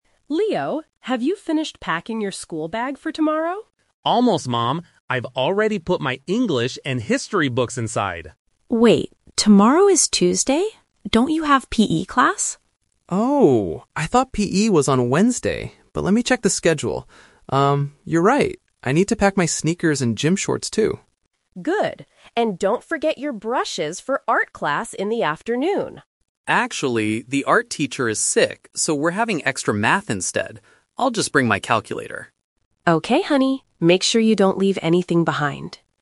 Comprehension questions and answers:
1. Why did Leo almost forget his PE gear?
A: He thought the class was on a different day.

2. Which subject will Leo have instead of Art?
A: Math

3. What item is Leo putting in his bag at the end of the conversation?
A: A calculator

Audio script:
Mom: Leo, have you finished packing your school bag for tomorrow?
Leo: Almost, Mom. I've already put my English and History books inside.
Mom: Wait, tomorrow is Tuesday. Don't you have PE class?
Leo: Oh! I thought PE was on Wednesday, but let me check the schedule... um, you're right! I need to pack my sneakers and gym shorts too.
Mom: Good. And don't forget your brushes for Art class in the afternoon.
Leo: Actually, the Art teacher is sick, so we're having extra Math instead.